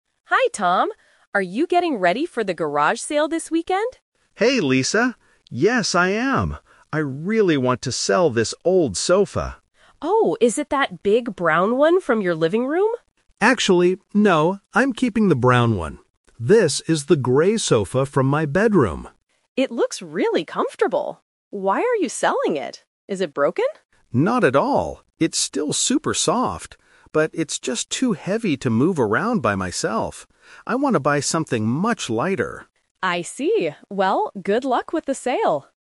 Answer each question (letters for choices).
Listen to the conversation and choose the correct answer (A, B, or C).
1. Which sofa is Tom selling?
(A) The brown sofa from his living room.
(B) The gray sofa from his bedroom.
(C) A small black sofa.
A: B

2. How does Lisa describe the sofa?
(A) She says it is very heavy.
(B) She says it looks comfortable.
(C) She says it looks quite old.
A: B

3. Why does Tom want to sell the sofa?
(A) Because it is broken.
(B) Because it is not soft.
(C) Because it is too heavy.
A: C

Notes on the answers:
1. Tom says, "This is the gray sofa from my bedroom." The Trap: Option (A) is a trap. Lisa asks if it is the brown sofa, but Tom says "Actually, no. I'm keeping the brown one." Option (C) is not mentioned at all.
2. Lisa looks at the sofa and says, "It looks really comfortable." The Trap: Option (A) is a trap because "heavy" is mentioned in the audio, but that is Tom's opinion, not Lisa's description.
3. Tom clearly states the reason: "But it's just too heavy to move around by myself." The Trap: Option (A) is a trap because Lisa asks "Is it broken?", but Tom immediately rejects it by saying "Not at all." Option (B) is also wrong because he says it is "super soft."

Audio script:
Lisa: Hi Tom! Are you getting ready for the garage sale this weekend?
Tom: Hey Lisa! Yes, I am. I really want to sell this old sofa.
Lisa: Oh, is it that big brown one from your living room?
Tom: Actually, no. I'm keeping the brown one. This is the gray sofa from my bedroom.
Lisa: It looks really comfortable. Why are you selling it? Is it broken?
Tom: Not at all, it's still super soft. But it's just too heavy to move around by myself. I want to buy something much lighter.
Lisa: I see. Well, good luck with the sale!